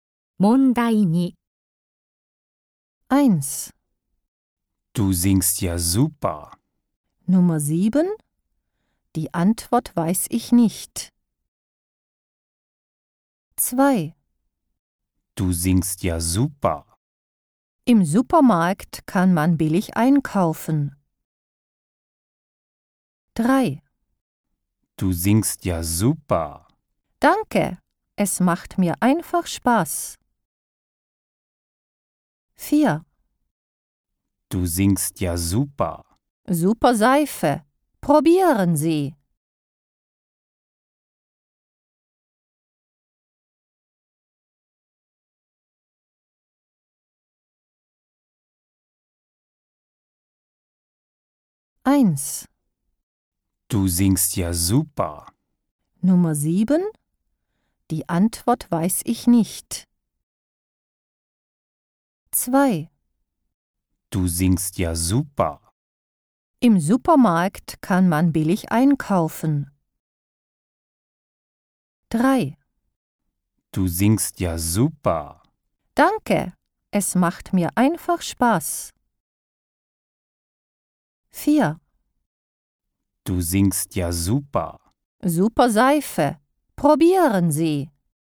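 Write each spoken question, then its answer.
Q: Du singst ja super.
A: 3: Danke, es macht mir einfach Spaß.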